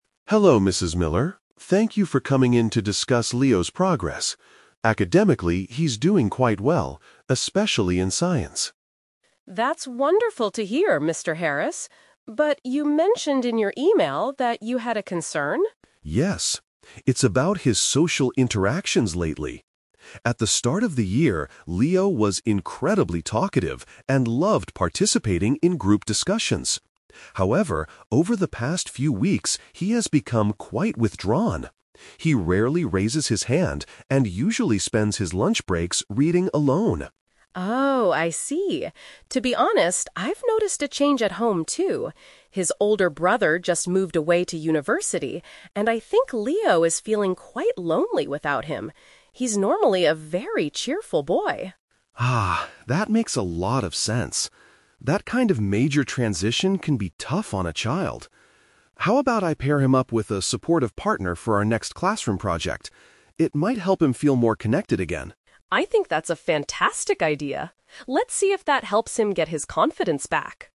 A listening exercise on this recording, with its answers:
Listen to a conversation between a teacher, Mr. Harris, and a parent, Mrs. Miller. For each question, choose the correct answer A, B, or (C).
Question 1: What is the MAIN reason for this meeting?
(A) To discuss Leo's excellent grades in science class.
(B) To talk about a recent change in Leo's behavior.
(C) To complain about Leo arguing with his classmates.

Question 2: How does Mr. Harris describe Leo's CURRENT behavior at school?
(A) He isolates himself from the other students.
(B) He is very talkative and enjoys group work.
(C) He refuses to do his reading homework.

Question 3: Why is Leo acting differently?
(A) He is being bullied by other children during lunch.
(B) He lacks confidence in his academic abilities.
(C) He misses his older sibling who recently left home.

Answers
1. (B) To talk about a recent change in Leo's behavior.
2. (A) He isolates himself from the other students.
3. (C) He misses his older sibling who recently left home.

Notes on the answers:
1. Mr. Harris says his concern is about Leo's "social interactions lately" and that he has "become quite withdrawn." This means they are discussing a change in how he acts. Trap Alert: Option A is a trap. Mr. Harris does mention Leo is doing well in science, but this is just a polite opening, not the main reason or "concern" for the meeting. Option C is not mentioned.
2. Mr. Harris says Leo has become "withdrawn" and spends his breaks "reading alone." To isolate oneself means to stay away from others. Trap Alert: Option B is a trap. Being "talkative" and liking "group discussions" was Leo's behavior at the start of the year (in the past), but the question asks about his current behavior. Option C is a trap using the word "reading", but he is reading for fun at lunch, not refusing homework.
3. Mrs. Miller explains that Leo's "older brother just moved away to university" and Leo is "feeling quite lonely without him." The word "sibling" is a synonym for brother/sister. Trap Alert: Option B is a trap. The mother hopes he gets his "confidence" back, but his lack of confidence right now is about social interactions, not his "academic abilities" (since he is doing well in science). Option A is a plausible reason in real life but is never mentioned in the audio.

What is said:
Mr. Harris: Hello, Mrs. Miller. Thank you for coming in to discuss Leo's progress. Academically, he's doing quite well, especially in science.
Mrs. Miller: That's wonderful to hear, Mr. Harris. But you mentioned in your email that you had a concern?
Mr. Harris: Yes. It's about his social interactions lately. At the start of the year, Leo was incredibly talkative and loved participating in group discussions. However, over the past few weeks, he has become quite withdrawn. He rarely raises his hand and usually spends his lunch breaks reading alone.
Mrs. Miller: Oh, I see. To be honest, I've noticed a change at home, too. His older brother just moved away to university, and I think Leo is feeling quite lonely without him. He's normally a very cheerful boy.
Mr. Harris: Ah, that makes a lot of sense. That kind of major transition can be tough on a child. How about I pair him up with a supportive partner for our next classroom project? It might help him feel more connected again.
Mrs. Miller: I think that's a fantastic idea. Let's see if that helps him get his confidence back.

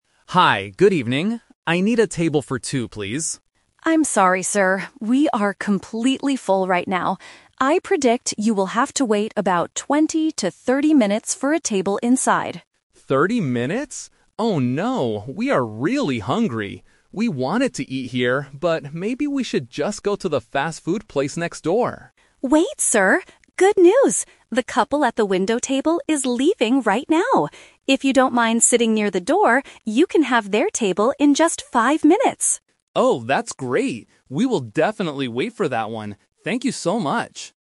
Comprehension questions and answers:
Listen to the conversation between a restaurant host and a customer. Choose the correct answer (A, B, or C).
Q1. How long does the host predict the wait will be at first?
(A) 5 minutes.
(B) 20 to 30 minutes.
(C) An hour.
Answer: (B) 20 to 30 minutes.

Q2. What did the customer almost decide to do?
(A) Wait inside for 30 minutes.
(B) Go home and cook dinner.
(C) Go to another restaurant.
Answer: (C) Go to another restaurant.

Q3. What happens at the end of the conversation?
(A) The customer leaves to eat fast food.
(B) The customer agrees to wait a few minutes for a table.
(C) The customer gets a table immediately without waiting.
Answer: (B) The customer agrees to wait a few minutes for a table.

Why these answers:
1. The host clearly states, "I predict you will have to wait about 20 to 30 minutes for a table inside."
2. Because he is hungry, the customer says, "maybe we should just go to the fast-food place next door."
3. The host offers a table in 5 minutes, and the customer says, "We will definitely wait for that one."

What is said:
Customer: Hi, good evening. I need a table for two, please.
Host: I'm sorry, sir. We are completely full right now. I predict you will have to wait about 20 to 30 minutes for a table inside.
Customer: 30 minutes? Oh no, we are really hungry. We wanted to eat here, but maybe we should just go to the fast-food place next door.
Host: Wait, sir! Good news. The couple at the window table is leaving right now. If you don't mind sitting near the door, you can have their table in just 5 minutes.

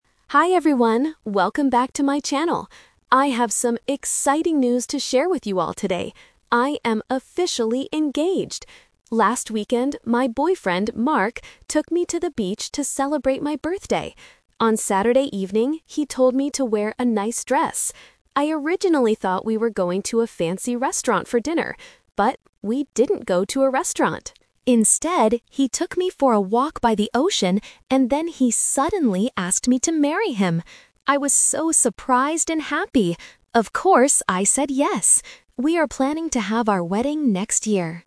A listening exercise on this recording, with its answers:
Listen to a vlogger talking about her weekend trip. For each question, choose the correct answer (A, B, or C).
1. What is the vlogger's exciting news?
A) She had a great birthday party.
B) She got engaged to her boyfriend.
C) She got a job at a fancy restaurant.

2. What did the couple actually do on Saturday evening?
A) They went for a walk by the ocean.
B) They ate dinner at a fancy restaurant.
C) They went shopping for a new dress.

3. When are they going to get married?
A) Next weekend.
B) Next month.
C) Next year.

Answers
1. B) She got engaged to her boyfriend.
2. A) They went for a walk by the ocean.
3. C) Next year.

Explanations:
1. The vlogger explicitly says at the beginning, "I am officially engaged!" (Option B - Key). Option A is a trap because she mentions they went to the beach to "celebrate my birthday," but her exciting news for the video is the engagement. Option C is a trap related to the restaurant mentioned later.
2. The vlogger says she "originally thought we were going to a fancy restaurant" (Option B - Trap). However, the word "But" introduces what actually happened: "he took me for a walk by the ocean" (Option A - Key). Option C is a trap because she mentions wearing a "nice dress", but she didn't go shopping for it.
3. At the end of the vlog, she clearly states, "We are planning to have our wedding next year" (Option C - Key). Option A (Next weekend) is a trap because "Last weekend" was when the proposal happened. Option B is a plausible distractor but is not mentioned.

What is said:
Vlogger: Hi everyone, welcome back to my channel! I have some exciting news to share with you all today: I am officially engaged! Last weekend, my boyfriend, Mark, took me to the beach to celebrate my birthday. On Saturday evening, he told me to wear a nice dress. I originally thought we were going to a fancy restaurant for dinner. But, we didn't go to a restaurant. Instead, he took me for a walk by the ocean, and then he suddenly asked me to marry him! I was so surprised and happy. Of course, I said yes! We are planning to have our wedding next year.

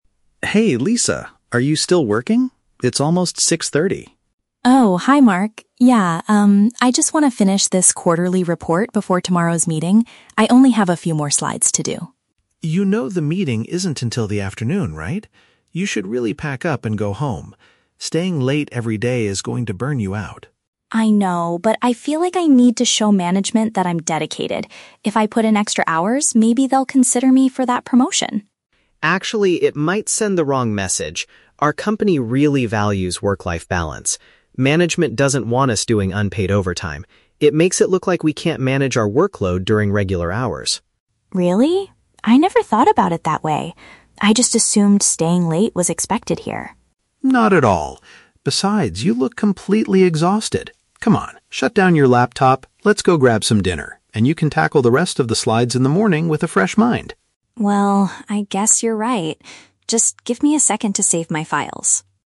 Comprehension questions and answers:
Listen to the conversation between two colleagues and choose the correct answer (A, B, or C).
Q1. Why is Lisa staying late at the office?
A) She has a very important meeting early tomorrow morning.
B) She wants to complete a presentation to impress her bosses.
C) She is waiting to receive a promotion letter from the manager.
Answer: B) She wants to complete a presentation to impress her bosses.

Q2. What is the company's attitude toward working extra hours, according to Mark?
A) They strongly encourage it as a sign of high dedication.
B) They only allow it if the employee is struggling with their workload.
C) They disapprove of staff working beyond their standard shifts for free.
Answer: C) They disapprove of staff working beyond their standard shifts for free.

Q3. What will Lisa most likely do next?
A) Stop working for the day and go get some food with Mark.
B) Tell Mark to go home first so she can finish the remaining slides.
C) Take her laptop to a restaurant to continue working during dinner.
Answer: A) Stop working for the day and go get some food with Mark.

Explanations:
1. The script uses paraphrasing. Lisa wants to finish her "quarterly report" and "slides" (a presentation) to show management she is "dedicated" (impress her bosses). Why the trap is wrong: Option (A) is a trap. While she has a meeting tomorrow, Mark specifically points out that the meeting "isn't until the afternoon," not early in the morning. Option (C) mentions "promotion," which is in the audio, but she is working to earn one, not waiting for a letter.
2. Mark states that management "doesn't want us doing unpaid overtime." This is paraphrased perfectly in Option C as disapproving of working "beyond their standard shifts for free." Why the trap is wrong: Option (A) is exactly what Lisa assumed (the trap), but Mark corrects her saying it "sends the wrong message." Option (B) is incorrect because Mark says working late makes it look like they can't manage their workload, which is viewed negatively, not as an exception to allow overtime.
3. Mark tells her to "shut down your laptop" and "grab some dinner." Lisa agrees, saying "I guess you're right" and asks for a second to "save my files" (meaning she is stopping). "Get some food" is a synonym for "grab some dinner". Why the trap is wrong: Option (B) is a trap based on her initial intention (finishing the slides), but she changes her mind at the end of the conversation. Option (C) is a plausible workaholic behavior but is never mentioned.

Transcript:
Mark: Hey Lisa, are you still working? It's almost 6:30.
Lisa: Oh, hi Mark. Yeah, um, I just want to finish this quarterly report before tomorrow's meeting. I only have a few more slides to do.
Mark: You know the meeting isn't until the afternoon, right? You should really pack up and go home. Staying late every day is going to burn you out.
Lisa: I know, but I feel like I need to show management that I'm dedicated. If I put in extra hours, maybe they'll consider me for that promotion.
Mark: Actually, it might send the wrong message. Our company really values work-life balance. Management doesn't want us doing unpaid overtime. It makes it look like we can't manage our workload during regular hours.
Lisa: Really? I never thought about it that way. I just assumed staying late was expected here.
Mark: Not at all. Besides, you look completely exhausted. Come on, shut down your laptop. Let's go grab some dinner, and you can tackle the rest of the slides in the morning with a fresh mind.

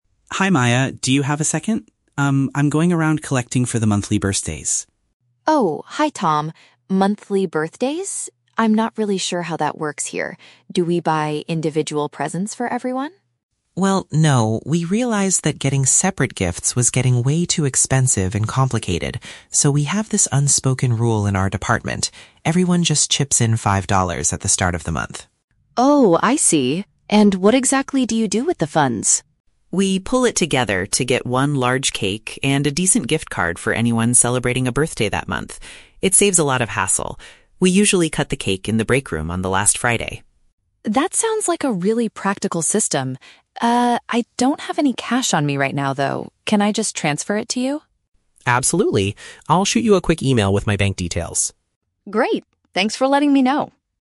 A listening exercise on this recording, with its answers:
Listen to the conversation between two colleagues and choose the correct answer (A, B, or C).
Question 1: How does the department handle employee birthdays?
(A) They expect each person to purchase a separate present for their coworkers.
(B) They collect a small contribution from everyone to buy shared items.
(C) They ask the company management to pay for a monthly restaurant dinner.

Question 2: What will the collected money be used for?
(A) A shared dessert and a shopping voucher.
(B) Party decorations to put up in the breakroom.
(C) Cash envelopes to give directly to the birthday staff.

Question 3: How will Maya give Tom the money?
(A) She will hand him some cash immediately.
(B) She will write him a check by the end of the week.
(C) She will send the payment to him electronically.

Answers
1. (B) They collect a small contribution from everyone to buy shared items.
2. (A) A shared dessert and a shopping voucher.
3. (C) She will send the payment to him electronically.

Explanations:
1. Tom explains that everyone "chips in five dollars" and they "pool it together" to buy a cake and a gift card. Option B uses synonyms ("small contribution", "shared items") to reflect this idea. Why the trap is wrong: Option (A) is a trap. Maya asks if they "buy individual presents," but Tom explicitly rejects this idea because it was "too expensive and complicated." Option (C) is a plausible workplace scenario but is never mentioned in the audio.
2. The script states they buy "one large cake" (a shared dessert) and a "gift card" (a shopping voucher). Why the trap is wrong: Option (B) is a trap because the word "breakroom" is mentioned in the audio (where they cut the cake), but they do not buy decorations. Option (C) is a trap because they buy a gift card, not direct cash envelopes.

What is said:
Tom: Hi Maya, do you have a second? Um, I'm going around collecting for the monthly birthdays.
Maya: Oh, hi Tom. Monthly birthdays? I'm not really sure how that works here. Do we buy individual presents for everyone?
Tom: Well, no. We realized that getting separate gifts was getting way too expensive and complicated. So, we have this unspoken rule in our department. Everyone just chips in five dollars at the start of the month.
Maya: Oh, I see. And what exactly do you do with the funds?
Tom: We pool it together to get one large cake and a decent gift card for anyone celebrating a birthday that month. It saves a lot of hassle. We usually cut the cake in the breakroom on the last Friday.
Maya: That sounds like a really practical system! Uh, I don't have any cash on me right now, though. Can I just transfer it to you?
Tom: Absolutely. I'll shoot you a quick email with my bank details.
Maya: Great, thanks for letting me know.

